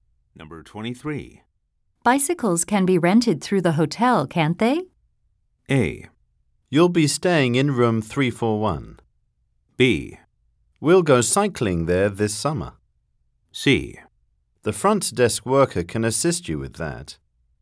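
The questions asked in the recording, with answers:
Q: Bicycles can be rented through the hotel, can't they?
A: C: The front desk worker can assist you with that.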